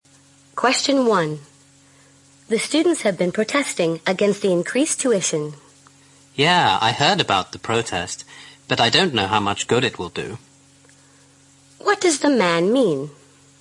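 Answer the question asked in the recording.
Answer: He doubts the protest will do much good.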